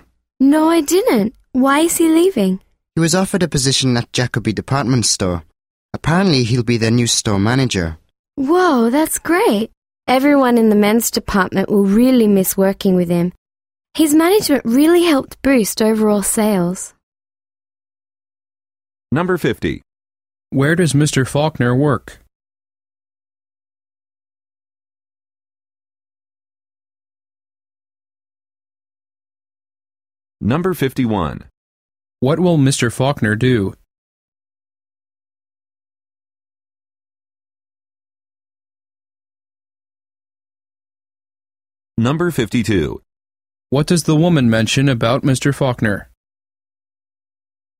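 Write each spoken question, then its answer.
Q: What will Mr. Faulkner do?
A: Become the new store manager at Jacoby Department Store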